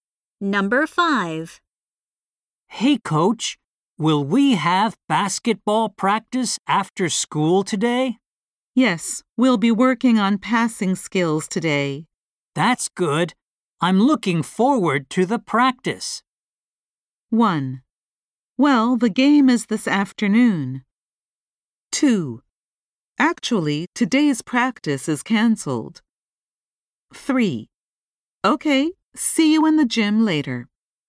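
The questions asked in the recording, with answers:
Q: That's good. I'm looking forward to the practice.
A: 3: Okay, see you in the gym later.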